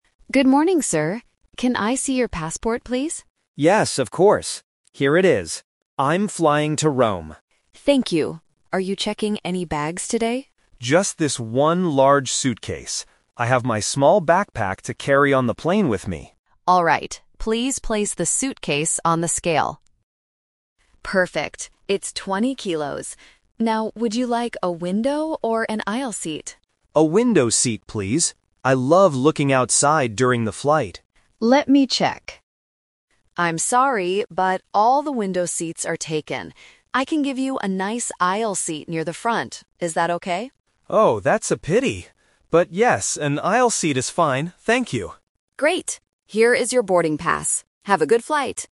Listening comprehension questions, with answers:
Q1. What luggage is the passenger checking in (giving to the agent)?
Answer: One large suitcase.

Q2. Why can't the passenger have a window seat?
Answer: Because they are all full.

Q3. What kind of seat does the passenger finally get?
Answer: An aisle seat.

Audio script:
Agent: Good morning, sir. Can I see your passport, please?
Passenger: Yes, of course. Here it is. I'm flying to Rome.
Agent: Thank you. Are you checking any bags today?
Passenger: Just this one large suitcase. I have my small backpack to carry on the plane with me.
Agent: Alright, please place the suitcase on the scale. Perfect, it's 20 kilos. Now, would you like a window or an aisle seat?
Passenger: A window seat, please. I love looking outside during the flight.
Agent: Let me check... I'm sorry, but all the window seats are taken. I can give you a nice aisle seat near the front. Is that okay?
Passenger: Oh, that's a pity. But yes, an aisle seat is fine. Thank you.